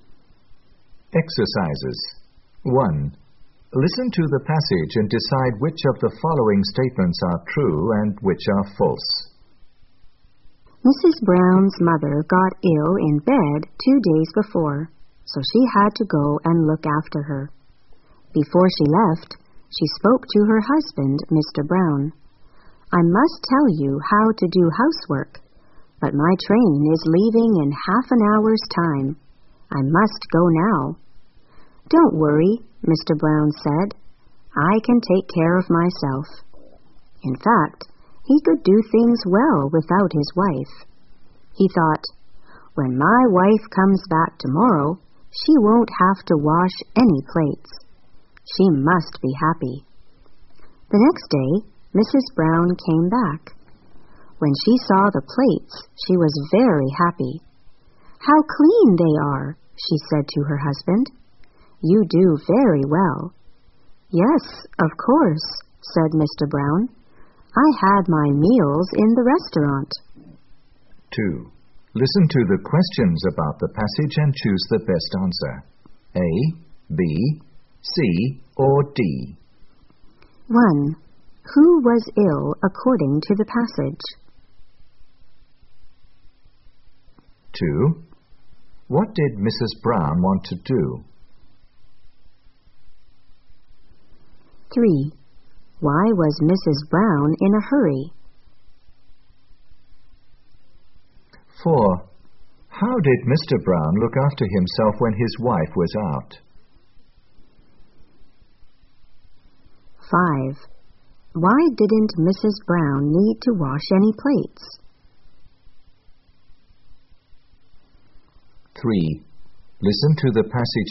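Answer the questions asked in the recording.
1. Mrs. Brown's mother
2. Go and look after her sick mother
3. Her train was leaving in half an hour
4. He had his meals in a restaurant
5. Mr. Brown ate in the restaurant, so no plates were used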